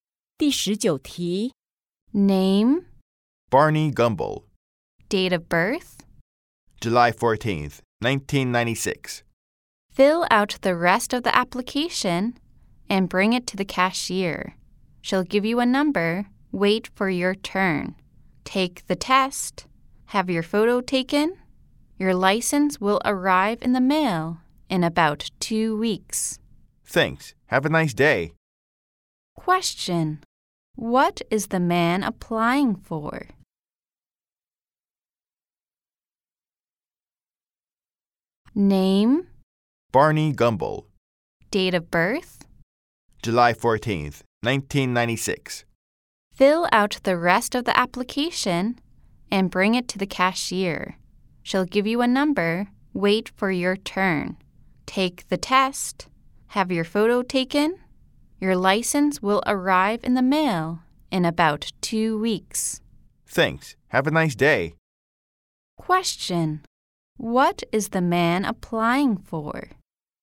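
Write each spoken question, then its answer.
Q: Question. What is the man applying for?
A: A driver's license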